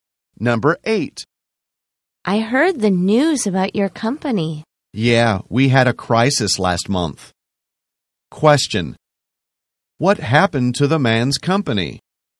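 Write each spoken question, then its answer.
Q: What happened to the man's company?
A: It had a crisis last month.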